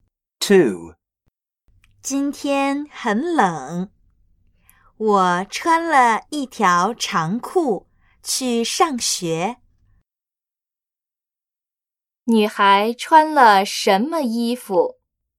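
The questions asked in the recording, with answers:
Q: 女孩穿了什么衣服?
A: 一条长裤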